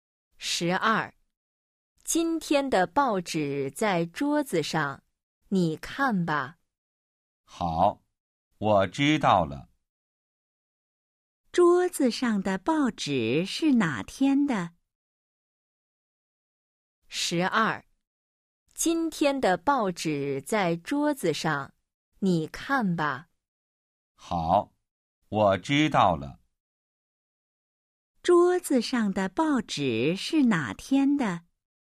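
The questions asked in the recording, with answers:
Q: 桌子上的报纸是哪天的?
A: 今天的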